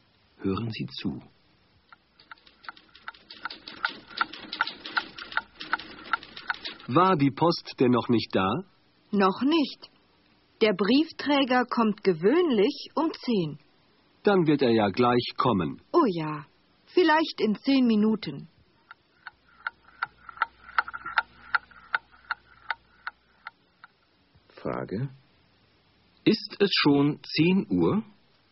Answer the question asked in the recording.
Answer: Nein, es ist noch nicht 10 Uhr.